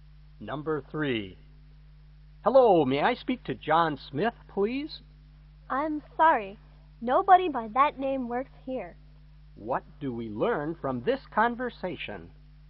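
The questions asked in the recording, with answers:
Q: What do we learn from this conversation?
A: No one called John Smith works there; the caller has the wrong number.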